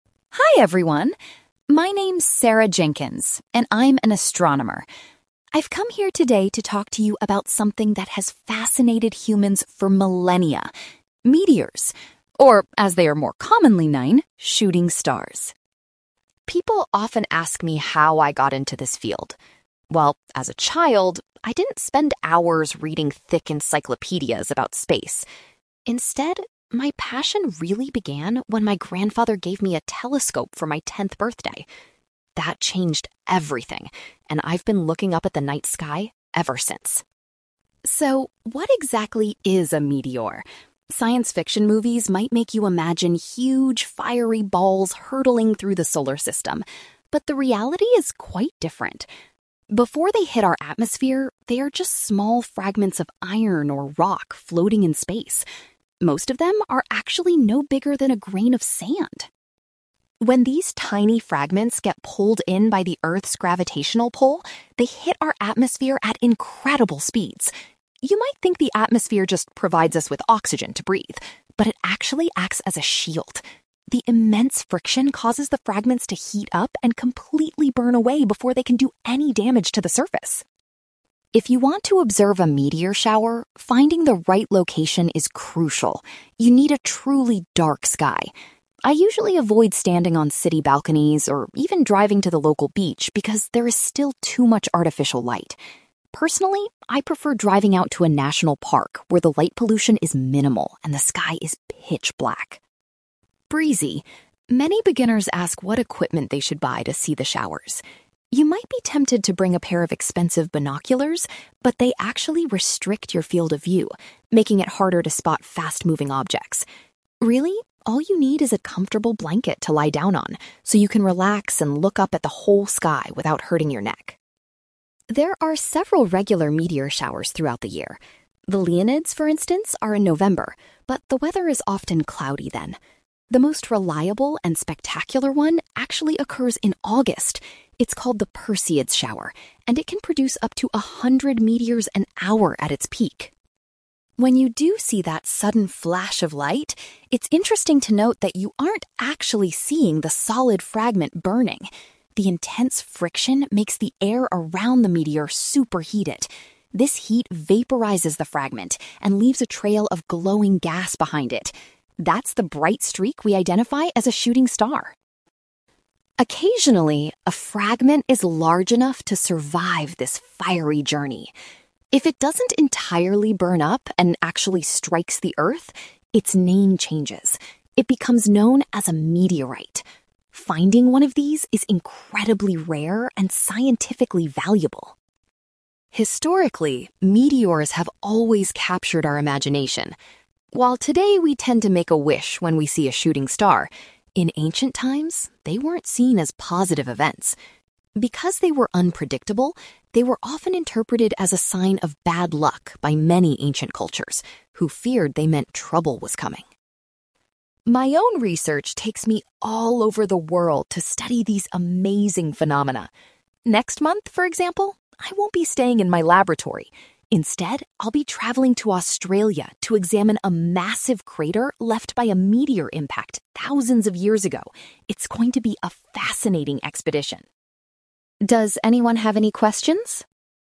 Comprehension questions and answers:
You will hear an astronomer called Sarah Jenkins talking about meteors, also known as shooting stars. For questions 9-18, complete the sentences with a word or short phrase.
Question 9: Sarah's passion for astronomy began after she received a (9)........................... as a present.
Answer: telescope

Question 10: Sarah explains that in space, meteors are simply chunks of iron or (10)........................... .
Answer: rock

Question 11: According to Sarah, the Earth's atmosphere functions as a (11)........................... to protect the planet.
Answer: shield

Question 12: Sarah recommends visiting a (12)........................... to get the best view of a meteor shower.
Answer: national park

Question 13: Sarah says that a (13)........................... is the only useful item to take when watching meteors.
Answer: blanket

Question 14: Sarah claims that the most spectacular meteor shower to watch takes place in (14)........................... .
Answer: August

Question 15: The bright streak we see in the sky is actually a line of glowing (15)........................... .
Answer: gas

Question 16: A meteor is re-named a (16)........................... if it successfully reaches the ground.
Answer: meteorite

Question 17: In the past, people believed that meteors were a sign of (17)........................... .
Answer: bad luck

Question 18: Sarah is planning to investigate a (18)........................... on her upcoming trip to Australia.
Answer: crater

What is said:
Sarah: Hi everyone. My name's Sarah Jenkins, and I'm an astronomer. I've come here today to talk to you about something that has fascinated humans for millennia: meteors, or as they are more commonly known, shooting stars.
People often ask me how I got into this field. Well, as a child, I didn't spend hours reading thick encyclopaedias about space. Instead, my passion really began when my grandfather gave me a telescope for my tenth birthday. That changed everything, and I've been looking up at the night sky ever since.
So, what exactly is a meteor? Science fiction movies might make you imagine huge fiery balls hurtling through the solar system, but the reality is quite different. Before they hit our atmosphere, they are just small fragments of iron or rock floating in space. Most of them are actually no bigger than a grain of sand!
When these tiny fragments get pulled in by the Earth's gravitational pull, they hit our atmosphere at incredible speeds. You might think the atmosphere just provides us with oxygen to breathe, but it actually acts as a shield. The immense friction causes the fragments to heat up and completely burn away before they can do any damage to the surface.
If you want to observe a meteor shower, finding the right location is crucial. You need a truly dark sky. I usually avoid standing on city balconies or even driving to the local beach because there is still too much artificial light. Personally, I prefer driving out to a national park where the light pollution is minimal and the sky is pitch black.
Many beginners ask what equipment they should buy to see the showers. You might be tempted to bring a pair of expensive binoculars, but they actually restrict your field of view, making it harder to spot fast-moving objects. Really, all you need is a comfortable blanket to lie down on so you can relax and look up at the whole sky without hurting your neck.
There are several regular meteor showers throughout the year. The Leonids, for instance, are in November, but the weather is often cloudy then. The most reliable and spectacular one actually occurs in August. It's called the Perseids shower, and it can produce up to a hundred meteors an hour at its peak.
When you do see that sudden flash of light, it's interesting to note that you aren't actually seeing the solid fragment burning. The intense friction makes the air around the meteor super-heated. This heat vaporises the fragment and leaves a trail of glowing gas behind it. That's the bright streak we identify as a shooting star.
Occasionally, a fragment is large enough to survive this fiery journey. If it doesn't entirely burn up and actually strikes the earth, its name changes. It becomes known as a meteorite. Finding one of these is incredibly rare and scientifically valuable.
Historically, meteors have always captured our imagination. While today we tend to make a wish when we see a shooting star, in ancient times, they weren't seen as positive events. Because they were unpredictable, they were often interpreted as a sign of bad luck by many ancient cultures, who feared they meant trouble was coming.
My own research takes me all over the world to study these amazing phenomena. Next month, for example, I won't be staying in my laboratory. Instead, I'll be travelling to Australia to examine a massive crater left by a meteor impact thousands of years ago. It's going to be a fascinating expedition!
Does anyone have any questions?

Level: B2